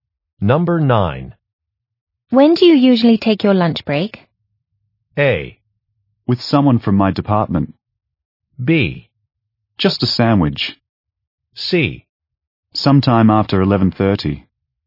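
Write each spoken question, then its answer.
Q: When do you usually take your lunch break?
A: C: Sometime after 11:30.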